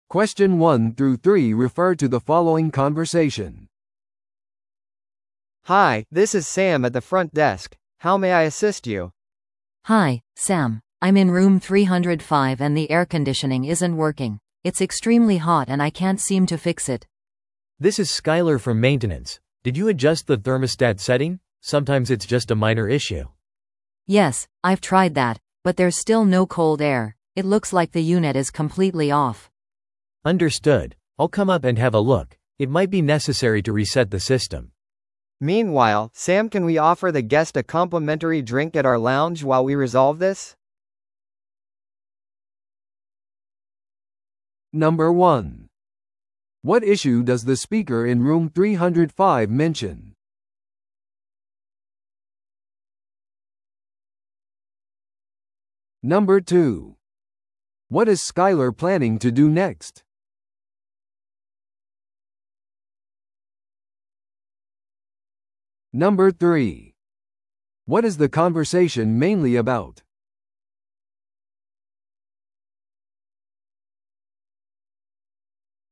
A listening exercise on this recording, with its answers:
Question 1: What issue does the speaker in Room 305 mention?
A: エアコンが動いていない。

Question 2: What is Skyler planning to do next?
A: 部屋に行ってエアコンを調査する。

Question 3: What is the conversation mainly about?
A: 部屋の設備に関する苦情を解決する。

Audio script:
A: Hi, this is Sam at the front desk, how may I assist you?
B: Hi, Sam. I'm in Room 305 and the air conditioning isn't working. It's extremely hot and I can't seem to fix it.
C: This is Skyler from maintenance. Did you adjust the thermostat setting? Sometimes it's just a minor issue.
B: Yes, I've tried that, but there's still no cold air. It looks like the unit is completely off.
C: Understood. I'll come up and have a look. It might be necessary to reset the system.
A: Meanwhile, Sam can we offer the guest a complimentary drink at our lounge while we resolve this?